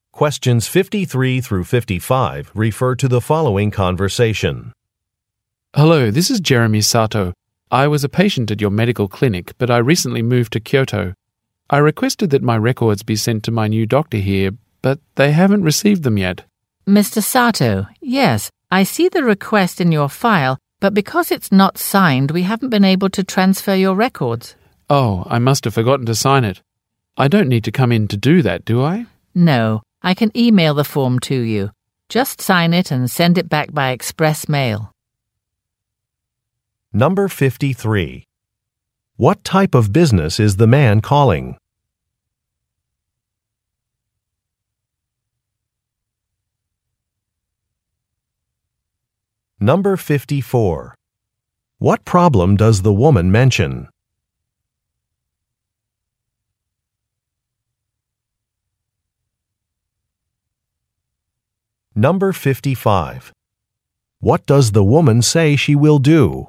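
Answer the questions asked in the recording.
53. A medical clinic
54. The records request form was not signed
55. Email the form to him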